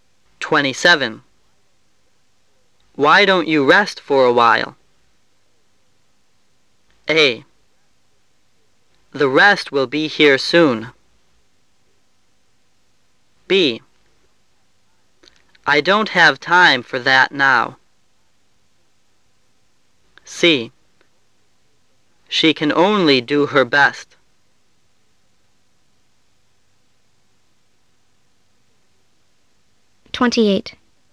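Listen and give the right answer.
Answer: B: I don't have time for that now.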